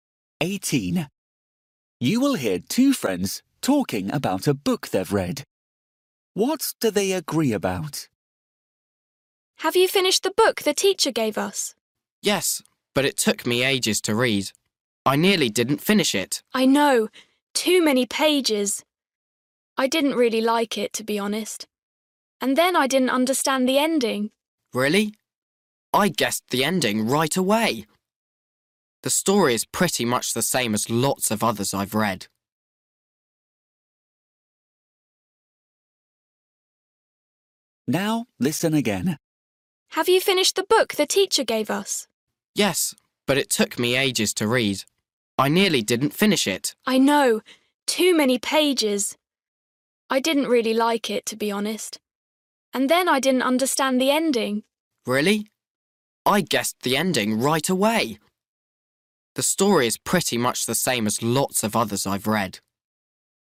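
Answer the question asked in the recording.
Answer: The book was too long.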